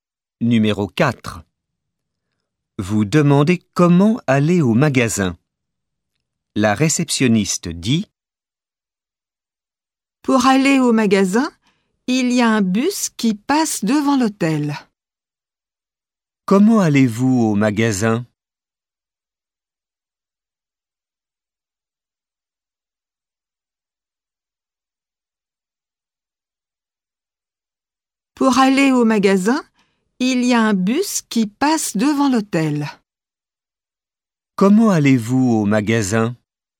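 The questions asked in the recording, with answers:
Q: Comment allez-vous au magasin ?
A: En bus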